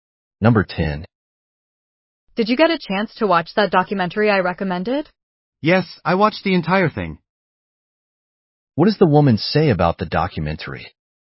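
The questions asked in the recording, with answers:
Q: What does the woman say about the documentary?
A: She watched the entire documentary.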